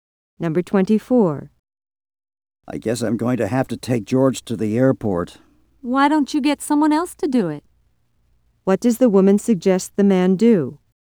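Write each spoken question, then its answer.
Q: What does the woman suggest the man do?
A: Get someone else to take George to the airport.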